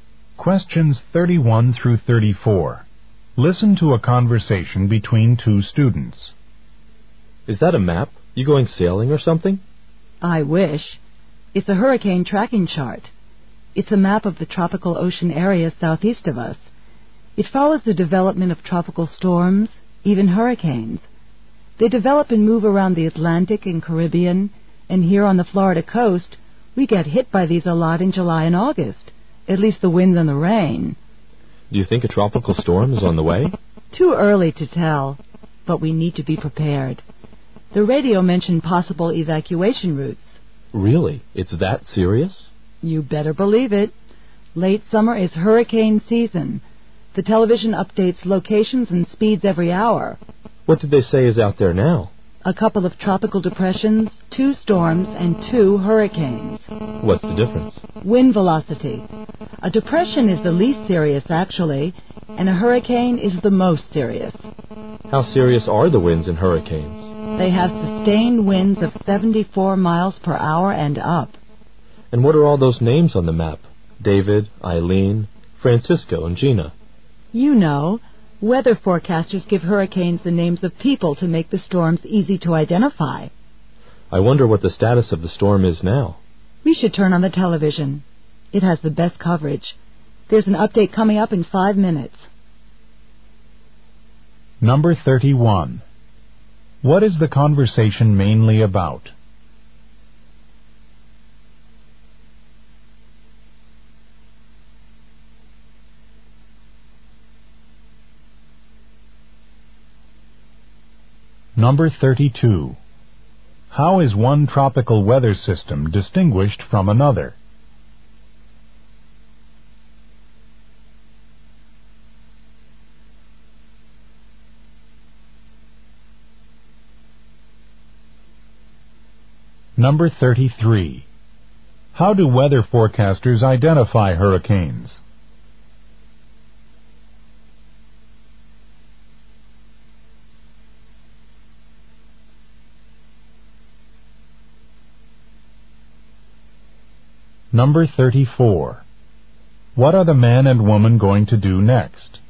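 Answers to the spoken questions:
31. Tracking hurricanes and tropical storms.
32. By wind velocity.
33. By giving them people's names.
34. Watch the television update.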